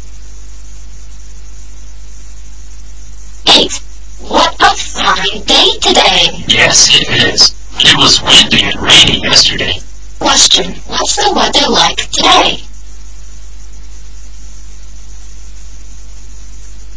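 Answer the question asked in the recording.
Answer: It's fine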